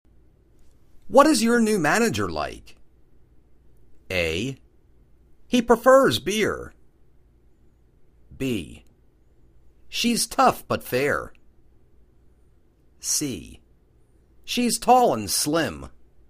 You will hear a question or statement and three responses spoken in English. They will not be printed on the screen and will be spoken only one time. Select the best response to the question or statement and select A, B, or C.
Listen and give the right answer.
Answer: She's tough but fair.